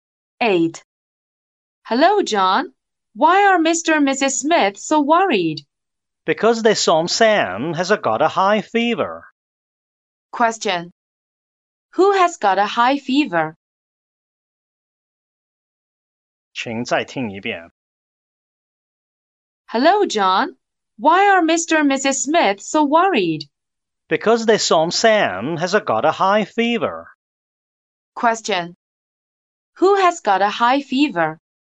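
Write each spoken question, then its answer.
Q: Who has got a high fever?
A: Sam, the Smiths' son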